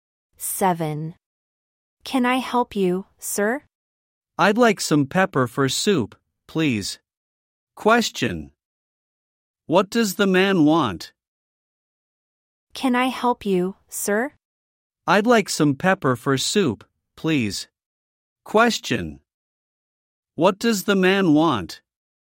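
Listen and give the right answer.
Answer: Some pepper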